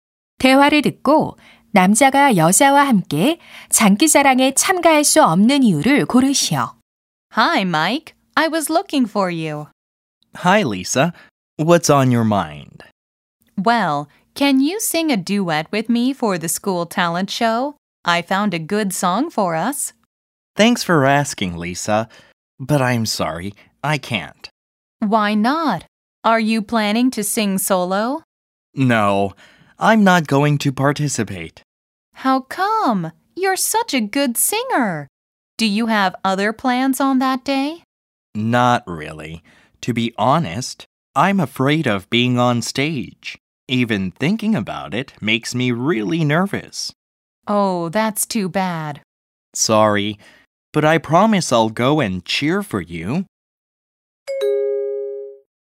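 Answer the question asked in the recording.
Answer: 무대에 서는 것이 두려워서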